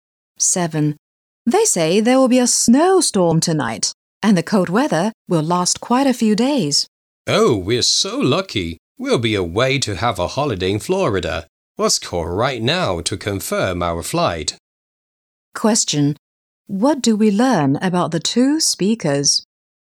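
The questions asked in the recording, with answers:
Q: What do we learn about the two speakers?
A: They will go on holiday to Florida and escape the cold weather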